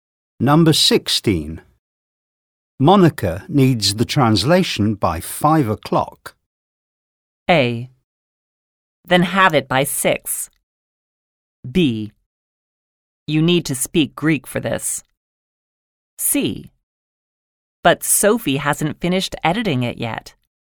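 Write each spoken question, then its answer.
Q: Monica needs the translation by 5 o'clock.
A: C: But Sophie hasn't finished editing it yet.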